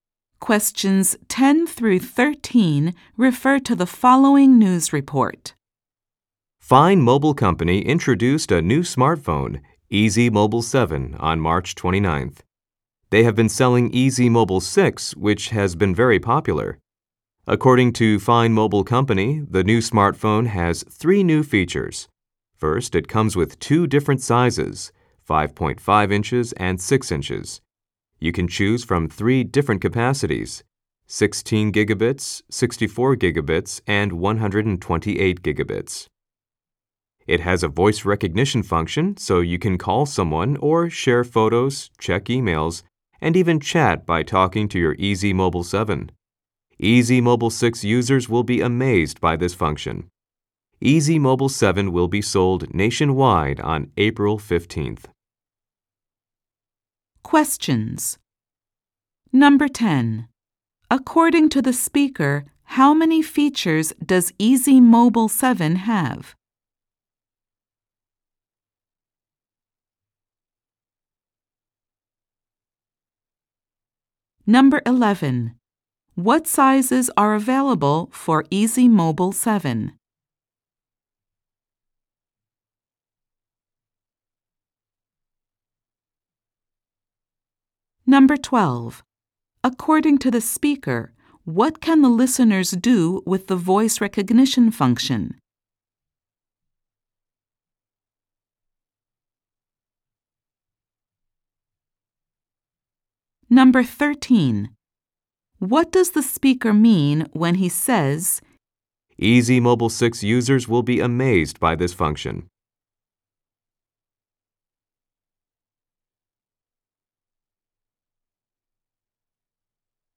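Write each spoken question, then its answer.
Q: According to the speaker, how many features does Easy Mobile 7 have?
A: Three

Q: What sizes are available for Easy Mobile 7?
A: 5.5 inches and 6 inches

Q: According to the speaker, what can the listeners do with the voice recognition function?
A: Call someone, share photos, check emails and chat by talking to the phone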